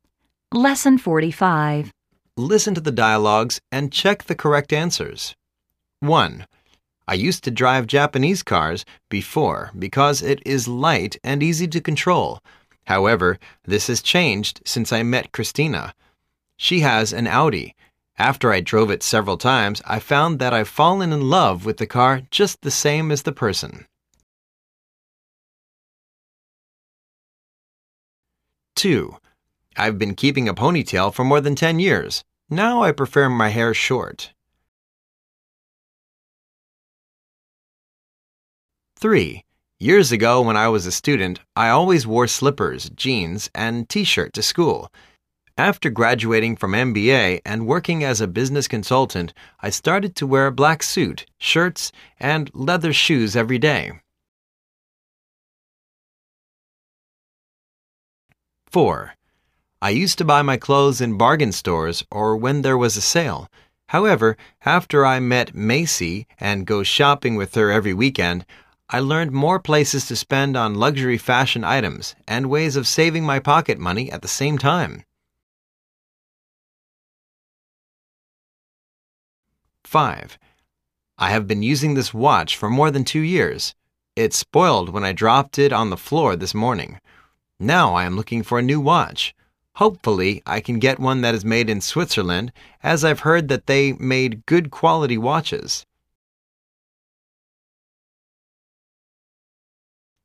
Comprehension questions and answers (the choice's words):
Listen to the dialogues and check the correct answers.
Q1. He used to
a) sell cars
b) drive an Audi car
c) drive a Toyota car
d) drive a Volvo car.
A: drive a Toyota car

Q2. She is changing her hairstyle to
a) a pony hair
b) a short hair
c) a long hair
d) a curly hair.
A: a short hair

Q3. Now, he is wearing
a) running shoes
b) slippers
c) leather shoes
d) a tie.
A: leather shoes

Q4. Macy taught her to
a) buy luxury fashion items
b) bargain with the store owner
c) buy branded items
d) steal others' pocket money.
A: buy luxury fashion items

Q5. He wishes to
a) repair his watch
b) buy a similar watch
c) buy a watch in Switzerland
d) buy a watch that's made in Switzerland.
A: buy a watch that's made in Switzerland.

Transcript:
1.I used to drive Japanese cars before because it is light and easy to control. However, this has changed since I met Christina. She has an Audi. After I drove it several times, I found that l've fallen in love with the car just the same as the person.
2.I've been keeping a pony tail for more than 10 years.Now, I prefer my hair short.
3.Years ago when I was a student, I always wore slippers,jeans and T-shirt to school. After graduating from MBA and working as a business consultant, I started to wear black suit, shirts and leather shoes everyday.
4.I used to buy my clothes in bargain stores or when there was a sale. However after I met Macy and go shopping with her every weekend, I learnt more places to spend on luxury fashion items and ways of saving my pocket money at the same time!
5.I have been using this watch for more than 2 years. It spoilt when I dropped it on the floor this morning_ Now I am looking for a new watch. Hopefully I could get one that is made in Switzerland as l've heard that they made good quality watches.